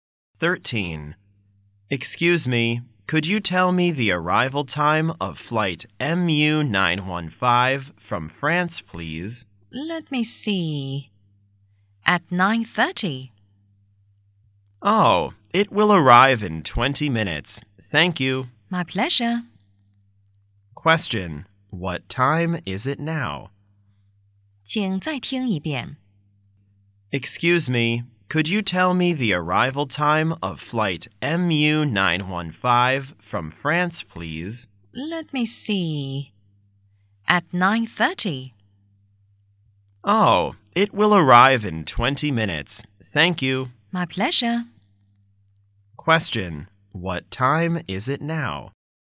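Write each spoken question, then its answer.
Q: What time is it now?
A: 9:10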